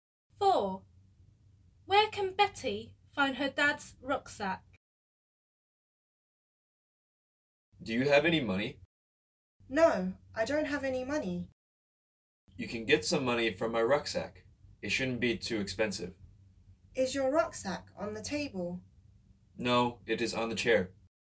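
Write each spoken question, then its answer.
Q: Where can Betty find her dad's rucksack?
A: on the chair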